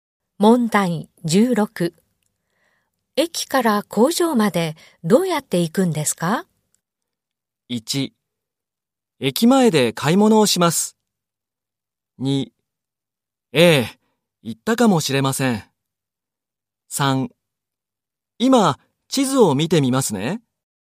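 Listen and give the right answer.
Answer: 3: 今、地図を見てみますね。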